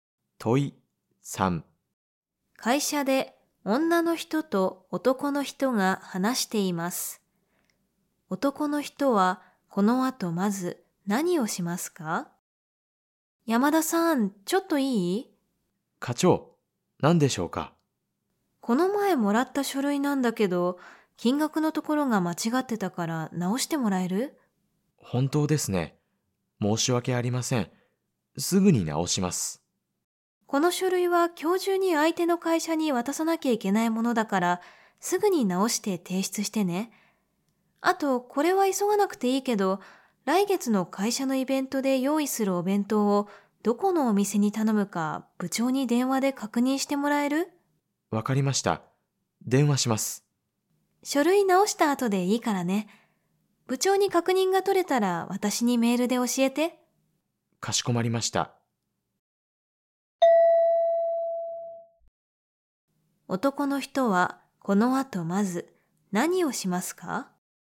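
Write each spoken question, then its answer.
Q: 男の人はこの後まず何をしますか?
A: 書類の金額を直す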